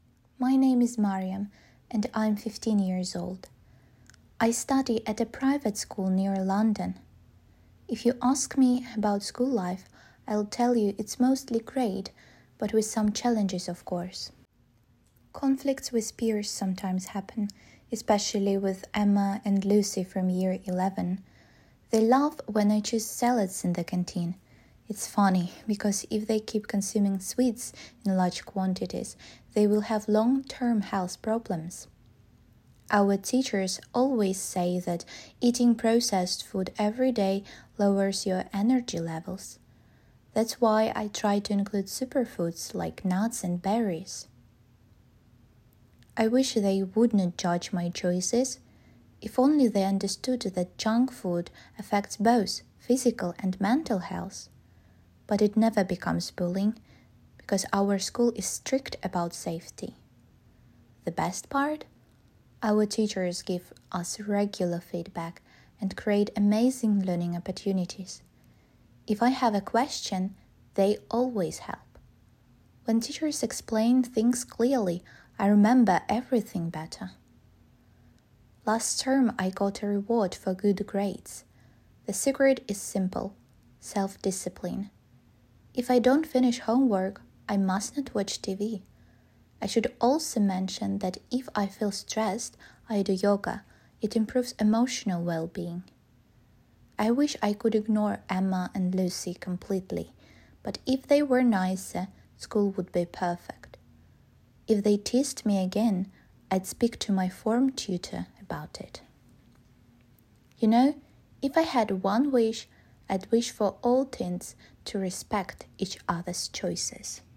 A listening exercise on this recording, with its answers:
Listen to Mariam's story about her school life. Read the statements and underline True, False, or Doesn't say.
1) Mariam attends a state school in central London.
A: False

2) Emma and Lucy are in Year 11.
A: True

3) Mariam's parents are strict about her TV watching habits.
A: Doesn't say

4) The teachers think processed food gives students energy.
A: False

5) Mariam's school ignores bullying problems.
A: False

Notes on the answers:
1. False — этот ответ подходит, так как текст прямо опровергает данное утверждение: "I study at a private school near London." — Я учусь в частной школе недалеко от Лондона. Варианты True и Doesn't say не подходят, так как противоположная информация есть в рассказе Мариам.
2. True — это правдивое утверждение, так как текст сообщает нам "especially with Emma and Lucy from Year 11" (особенно с Эммой и Люси из 11-го класса). Варианты False и Doesn't say не подходят, так как 11-й класс указан в рассказе.
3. Вариант Doesn't say подходит, так как текст не упоминает роль родителей, Мариам говорит только о своей дисциплине: "If I don't finish homework, I mustn't watch TV" (Если не сделаю уроки, я не смотрю телевизор). О родителях она не упоминает. Варианты True и False не подходят, так как текст не опровергает это утверждение, просто не содержит такой информации.
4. False — этот вариант подходит, так как учителя утверждают обратное: "eating processed food every day lowers your energy levels" (переработанная пища снижает уровень энергии). True и Doesn't say не подходят, так как в рассказе Мариам есть прямое опровержение этого утверждения.
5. False — это ложное утверждение, так как Мариам упоминает, что школа активно противодействует травле: "our school is strict about safety" (школа строго следит за безопасностью).

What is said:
My name is Mariam, and I'm 15 years old. I study at a private school near London. If you ask me about school life, I'll tell you it's mostly great, but with some challenges, of course.
Conflicts with peers sometimes happen, especially with Emma and Lucy from Year 11. They laugh when I choose salads in the canteen. It's funny because if they keep consuming sweets in large quantities, they'll have long-term health problems. Our teachers always say that eating processed food every day lowers your energy levels. That's why I try to include superfoods like nuts and berries.
I wish they wouldn't judge my choices. If only they understood that junk food affects both physical and mental health! But it never becomes bullying, because our school is strict about safety.
The best part? Our teachers give us regular feedback and create amazing learning opportunities. If I have a question, they always help. When teachers explain things clearly, I remember everything better.
Last term, I got a reward for good grades. The secret is simple: self-discipline. If I don't finish homework, I mustn't watch TV. I should also mention that if I feel stressed, I do yoga, it improves emotional well-being.
I wish I could ignore Emma and Lucy completely, but if they were nicer, school would be perfect! If they teased me again, I'd speak to my form tutor about it.
You know if I had one wish, I'd wish for all teens to respect each other's choices!

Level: 10 класс